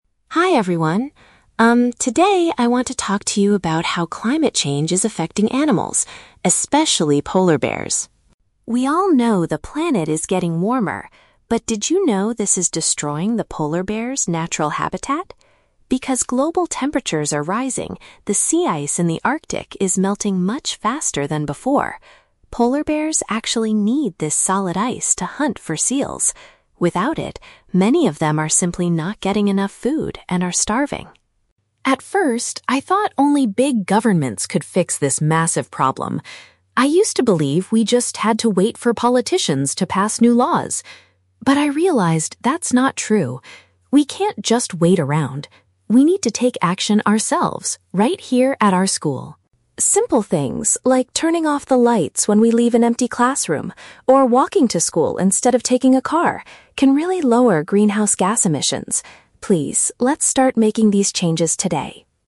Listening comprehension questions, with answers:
Listen to a student giving a presentation to her class and choose the correct answer (A, B, or C) for each question.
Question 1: What is the main problem polar bears are currently facing?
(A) They cannot catch enough food because the frozen water is disappearing.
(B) They are migrating to cities because the Arctic is getting too crowded.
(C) They are being hunted by other dangerous animals on the sea ice.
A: They cannot catch enough food because the frozen water is disappearing.

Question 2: What did the speaker initially believe about solving climate change?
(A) That ordinary students needed to lead the environmental protests.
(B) That only top political leaders had the power to stop it.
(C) That the problem was too complicated for anyone to understand.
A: That only top political leaders had the power to stop it.

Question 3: What is one specific action the student suggests her classmates do?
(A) Ride their bicycles to the campus every day instead of walking.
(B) Donate money to organizations that protect the starving polar bears.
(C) Switch off electrical items in rooms that are not being used.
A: Switch off electrical items in rooms that are not being used.

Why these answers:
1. Emily says that the "sea ice in the Arctic is melting" and without it, polar bears are "not getting enough food." (Paraphrasing: frozen water is disappearing = sea ice is melting; cannot catch enough food = not getting enough food / starving). Why the trap is wrong: Options (B) and (C) are unmentioned. The audio mentions "hunt," but it's the bears hunting for food, not being hunted by others.
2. Emily states, "At first, I thought only big governments could fix this massive problem... wait for politicians." (Paraphrasing: top political leaders = big governments / politicians; power to stop it = fix this massive problem). Why the trap is wrong: Option (A) is the trap. She now believes that students need to "take action ourselves," but the question asks what she initially (at first) believed.
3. Emily suggests "turning off the lights when we leave an empty classroom." (Paraphrasing: Switch off electrical items = turning off the lights; rooms not being used = empty classroom). Why the trap is wrong: Option (A) is the trap. She mentions different modes of transport, but she suggests "walking to school instead of taking a car," not riding bicycles instead of walking. Option (B) is a plausible action to help bears, but it is never mentioned in the speech.

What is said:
Emily: Hi everyone. Um, today I want to talk to you about how climate change is affecting animals, especially polar bears.
We all know the planet is getting warmer. But did you know this is destroying the polar bears' natural habitat? Because global temperatures are rising, the sea ice in the Arctic is melting much faster than before. Polar bears actually need this solid ice to hunt for seals. Without it, many of them are simply not getting enough food and are starving.
At first, I thought only big governments could fix this massive problem. I used to believe we just had to wait for politicians to pass new laws. But I realized that's not true. We can't just wait around. We need to take action ourselves, right here at our school.
Simple things, like turning off the lights when we leave an empty classroom, or walking to school instead of taking a car, can really lower greenhouse gas emissions. Please, let's start making these changes today.

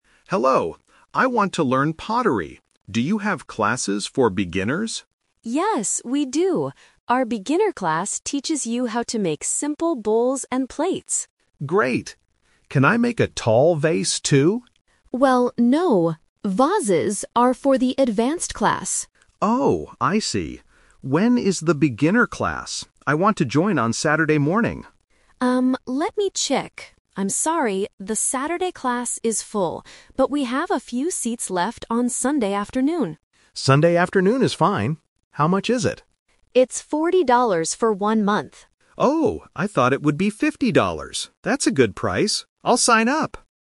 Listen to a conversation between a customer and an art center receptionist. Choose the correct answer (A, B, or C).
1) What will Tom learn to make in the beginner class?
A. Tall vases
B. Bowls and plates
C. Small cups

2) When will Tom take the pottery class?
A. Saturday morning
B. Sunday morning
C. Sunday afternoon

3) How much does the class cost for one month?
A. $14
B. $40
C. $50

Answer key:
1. Bowls and plates
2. Sunday afternoon
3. $40

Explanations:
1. Lisa explicitly says: "Our beginner class teaches you how to make simple bowls and plates."
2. Lisa offers a different time and Tom agrees: "Sunday afternoon is fine."
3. Lisa clearly states the price: "It's forty dollars for one month."

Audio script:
Tom: Hello. I want to learn pottery. Do you have classes for beginners?
Lisa: Yes, we do! Our beginner class teaches you how to make simple bowls and plates.
Tom: Great! Can I make a tall vase, too?
Lisa: Well, no. Vases are for the advanced class.
Tom: Oh, I see. When is the beginner class? I want to join on Saturday morning.
Lisa: Um, let me check... I'm sorry, the Saturday class is full. But we have a few seats left on Sunday afternoon.
Tom: Sunday afternoon is fine. How much is it?
Tom: Oh, I thought it would be fifty dollars. That's a good price. I'll sign up!

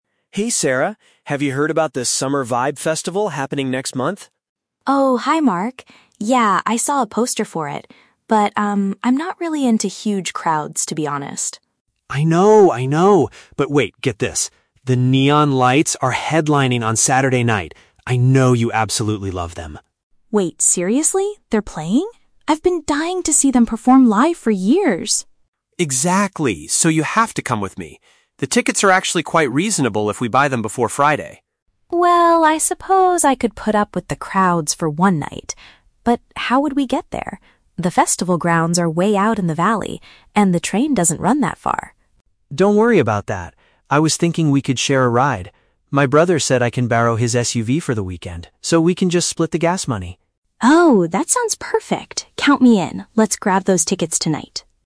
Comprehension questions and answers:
Listen to a conversation between two friends and choose the correct answer (A, B, or C) for each question.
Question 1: What is Sarah's initial reaction to the festival?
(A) She is eager to buy tickets immediately.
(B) She is hesitant because she dislikes large gatherings of people.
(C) She is worried about the high price of the tickets.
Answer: She is hesitant because she dislikes large gatherings of people.

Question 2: Why does Sarah change her mind and decide to go?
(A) Mark offers to pay for her entrance fee.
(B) She finds out that the location is close to her house.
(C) A music group she is passionate about will be performing.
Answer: A music group she is passionate about will be performing.

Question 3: How do the two friends plan to travel to the event?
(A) By taking the local public transportation.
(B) By driving together in a borrowed vehicle.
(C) By renting a large car for the weekend.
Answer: By driving together in a borrowed vehicle.

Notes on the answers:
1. In the audio, Sarah says, "I'm not really into huge crowds." Option (B) uses paraphrasing ("dislikes large gatherings of people"). Option (C) is a trap; the price of the tickets is mentioned later by Mark as being "quite reasonable," which is not her initial worry.
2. Mark mentions that "The Neon Lights are headlining" and Sarah responds that she has "been dying to see them perform live for years." Option (C) is a paraphrase of this. Option (B) is a trap; the location is mentioned, but it is actually far away ("way out in the valley"). Option (A) is plausible but not mentioned in the audio.
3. Mark says they can "share a ride" and that he can "borrow his SUV" from his brother. Option (B) perfectly paraphrases this. Option (A) is a trap; the train is mentioned, but Sarah says it "doesn't run that far." Option (C) is also a trap; they are using an SUV, but it is borrowed from a family member, not rented from a company.

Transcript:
Mark: Hey, Sarah! Have you heard about the Summer Vibe Festival happening next month?
Sarah: Oh, hi Mark. Yeah, I saw a poster for it. But, um, I'm not really into huge crowds, to be honest.
Mark: I know, I know. But wait, get this—The Neon Lights are headlining on Saturday night! I know you absolutely love them.
Sarah: Wait, seriously? They're playing? I've been dying to see them perform live for years!
Mark: Exactly! So, you have to come with me. The tickets are actually quite reasonable if we buy them before Friday.
Sarah: Well, I suppose I could put up with the crowds for one night. But how would we get there? The festival grounds are way out in the valley, and the train doesn't run that far.
Mark: Don't worry about that. I was thinking we could share a ride. My brother said I can borrow his SUV for the weekend, so we can just split the gas money.

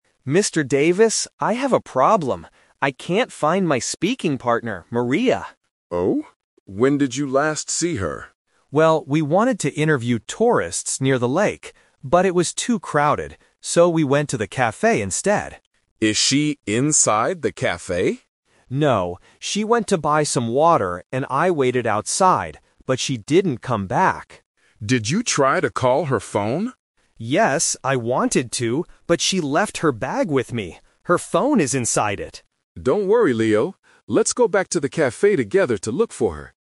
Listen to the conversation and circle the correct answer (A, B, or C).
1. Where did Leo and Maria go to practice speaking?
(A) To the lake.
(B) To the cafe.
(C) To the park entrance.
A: To the cafe.

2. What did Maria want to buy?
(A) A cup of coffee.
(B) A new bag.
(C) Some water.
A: Some water.

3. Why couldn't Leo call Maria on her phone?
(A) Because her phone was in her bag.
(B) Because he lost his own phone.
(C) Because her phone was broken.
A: Because her phone was in her bag.

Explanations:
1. Leo explains their final location: "So, we went to the cafe instead." Why the trap is wrong: Option (A) is the trap (The Twist). Leo says they "wanted to interview tourists near the lake," but they didn't do it because it was too crowded. Option (C) was not mentioned.
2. Leo says, "She went to buy some water..." Why the trap is wrong: Option (A) is a very strong trap. They are at a "cafe", so students might guess she bought coffee, but the audio specifically says "water". Option (B) is a trap using the word "bag" which is mentioned later in the audio.
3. Leo explains why he can't call her: "...she left her bag with me. Her phone is inside it!" Why the trap is wrong: Option (B) is the trap. The audio mentions wanting to call, but Leo didn't lose his phone; he has Maria's phone with him. Option (C) is a plausible guess but was not mentioned.

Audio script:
Leo: Mr. Davis, I have a problem. I can't find my speaking partner, Maria.
Mr. Davis: Oh? When did you last see her?
Leo: Well, we wanted to interview tourists near the lake. But it was too crowded. So, we went to the cafe instead.
Mr. Davis: Is she inside the cafe?
Leo: No. She went to buy some water, and I waited outside. But she didn't come back.
Mr. Davis: Did you try to call her phone?
Leo: Yes, I wanted to, but she left her bag with me. Her phone is inside it!

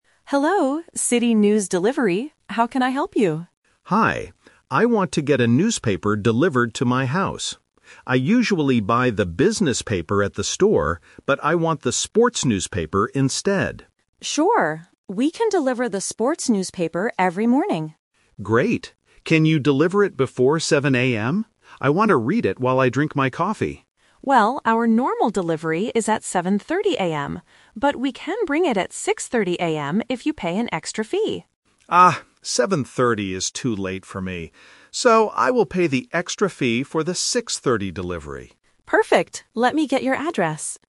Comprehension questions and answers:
Listen to the conversation and choose the correct answer (A, B, or C).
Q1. What kind of newspaper does the customer want to receive at home?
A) The business paper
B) The sports newspaper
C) The local news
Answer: The sports newspaper

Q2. Why does the customer want the newspaper early in the morning?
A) To read it while drinking coffee.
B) To read it before going to the gym.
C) To read it on the bus to work.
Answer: To read it while drinking coffee.

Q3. What time will the newspaper be delivered?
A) 7:00 AM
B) 7:30 AM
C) 6:30 AM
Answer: 6:30 AM

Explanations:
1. The customer says, "I usually buy the business paper at the store, but I want the sports newspaper instead." Option A (The business paper) is a trap because it is his old habit, not his new order. Option C is not mentioned.
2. The customer clearly states, "I want to read it while I drink my coffee." Options B and C are plausible reasons for wanting a newspaper early, but they are not mentioned in the audio.
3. The customer says, "So, I will pay the extra fee for the 6:30 delivery." Option A (7:00 AM) is a trap because he asked for it before 7:00 AM. Option B (7:30 AM) is a trap because it is the normal delivery time, but he rejected it because it is "too late".

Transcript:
Clerk: Hello, City News Delivery. How can I help you?
Customer: Hi. I want to get a newspaper delivered to my house. I usually buy the business paper at the store, but I want the sports newspaper instead.
Clerk: Sure. We can deliver the sports newspaper every morning.
Customer: Great. Can you deliver it before 7:00 AM? I want to read it while I drink my coffee.
Clerk: Well, our normal delivery is at 7:30 AM. But we can bring it at 6:30 AM if you pay an extra fee.
Customer: Ah, 7:30 is too late for me. So, I will pay the extra fee for the 6:30 delivery.

